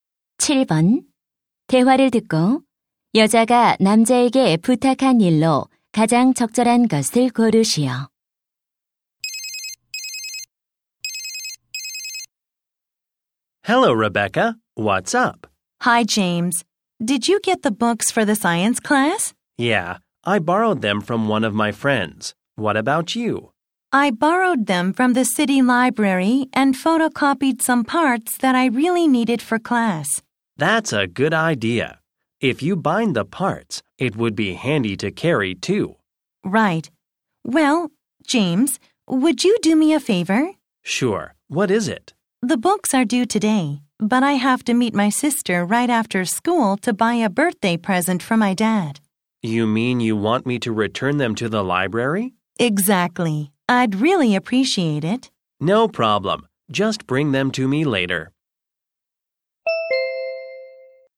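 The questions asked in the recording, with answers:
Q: 대화를 듣고 여자가 남자에게 부탁한 일로 가장 적절한 것을 고르시오.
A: 도서관에 책 반납하기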